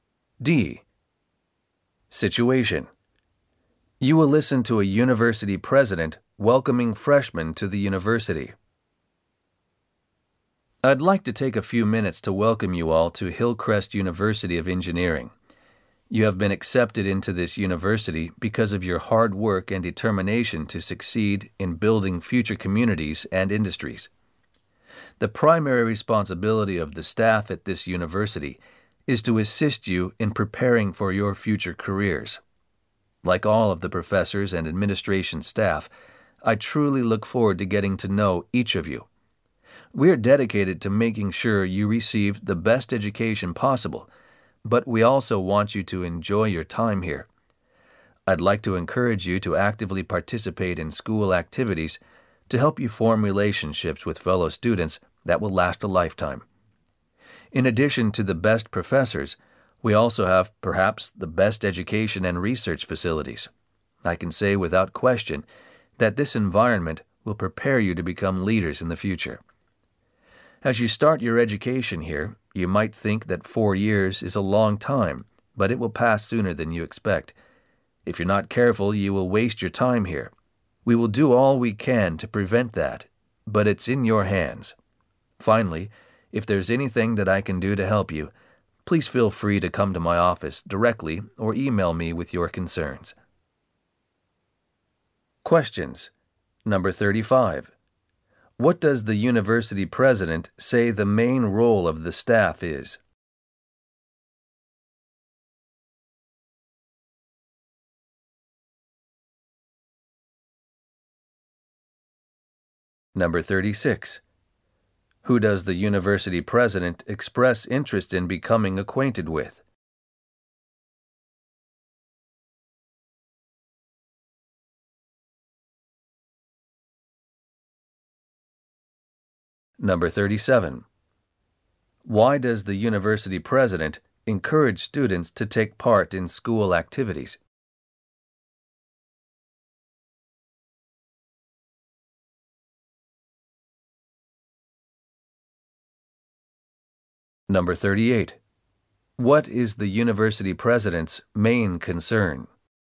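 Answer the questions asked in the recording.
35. To help students prepare for their future careers
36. Each of the new students
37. To form lifelong relationships with fellow students
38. That students might waste their time at university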